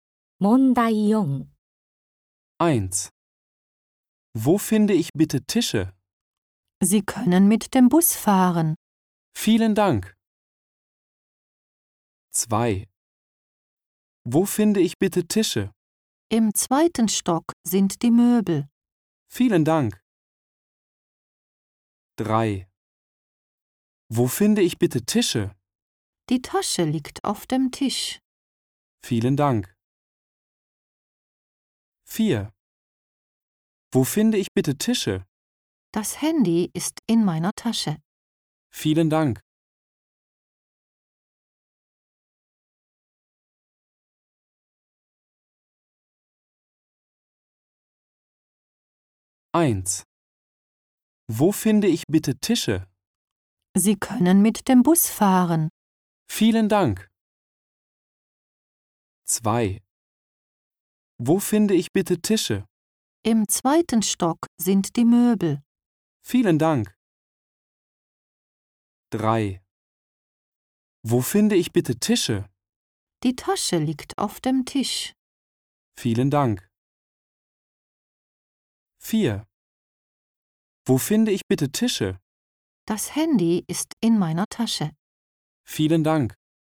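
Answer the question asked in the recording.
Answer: 2: Im zweiten Stock sind die Möbel.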